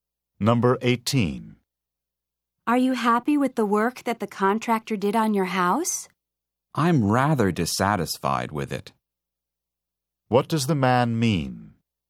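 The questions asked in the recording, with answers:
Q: What does the man mean?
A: He is not satisfied with the contractor's work.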